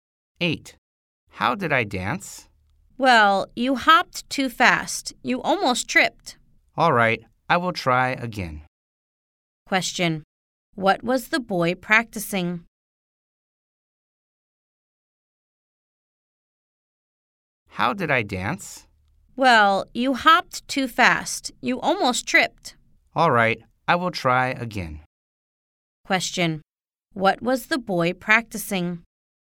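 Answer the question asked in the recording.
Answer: Dancing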